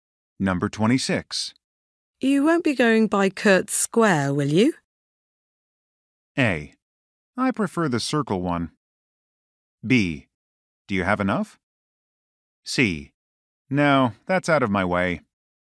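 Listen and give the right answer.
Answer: C: No, that's out of my way.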